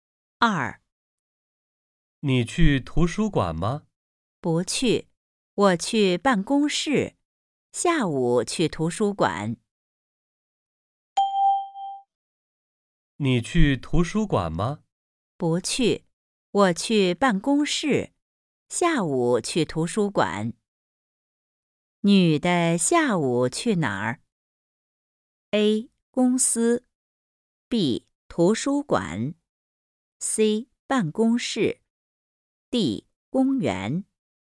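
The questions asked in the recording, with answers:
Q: 女的下午去哪儿?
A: B: 图书馆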